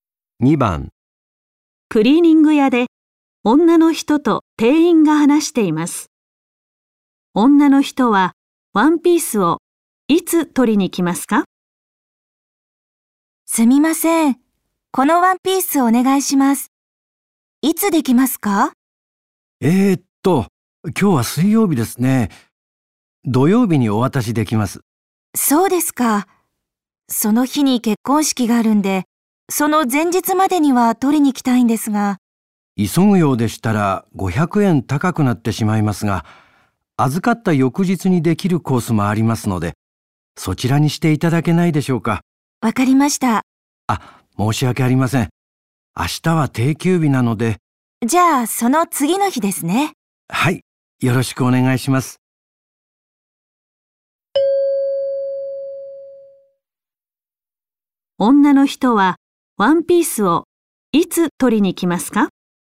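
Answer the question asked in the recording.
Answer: 金曜日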